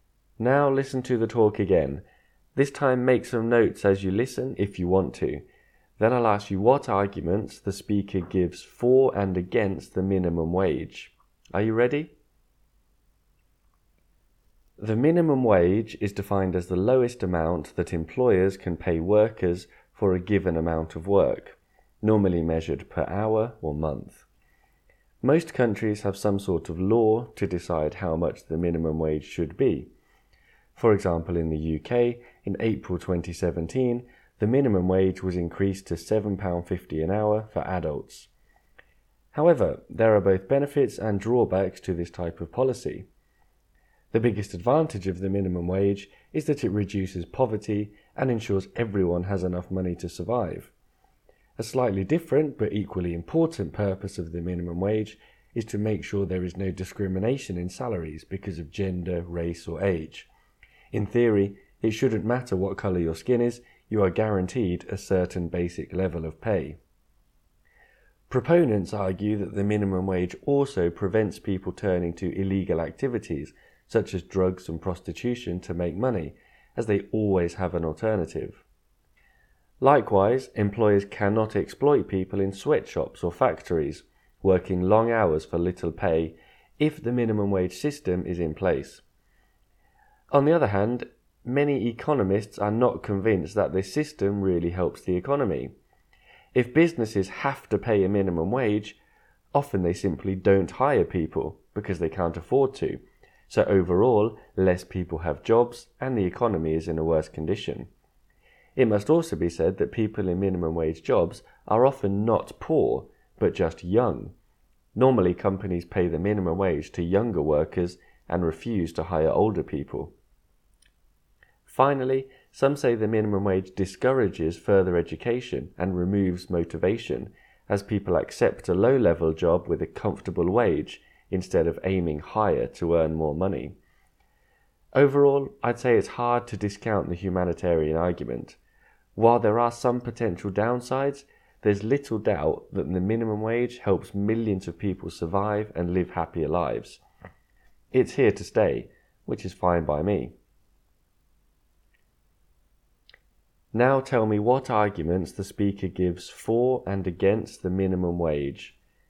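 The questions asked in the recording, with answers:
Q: Now tell me what arguments the speaker gives for and against the minimum wage.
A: For: it reduces poverty, prevents pay discrimination, stops people turning to illegal activities and stops exploitation. Against: businesses hire fewer people, minimum-wage workers are often young rather than poor, and it discourages further education and ambition.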